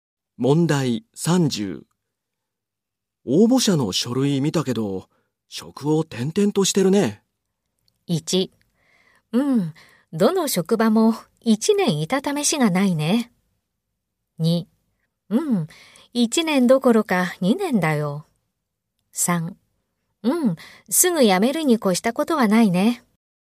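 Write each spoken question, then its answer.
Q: 応募者の書類見たけど、職を転々としてるね。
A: 1: うん、どの職場も1年いたためしがないね。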